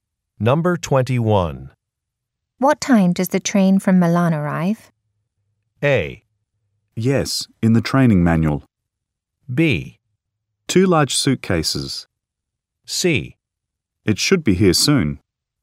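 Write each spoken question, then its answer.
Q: What time does the train from Milan arrive?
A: C: It should be here soon.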